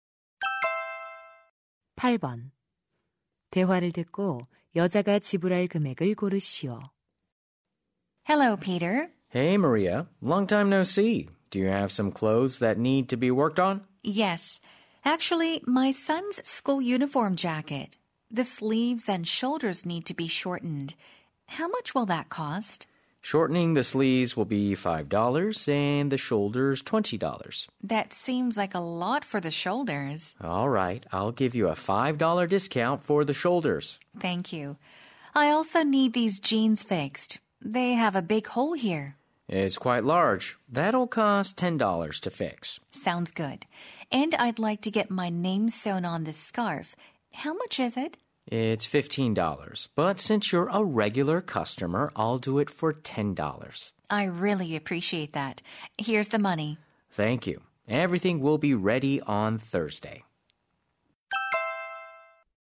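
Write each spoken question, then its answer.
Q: 대화를 듣고 여자가 지불할 금액을 고르시오.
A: $40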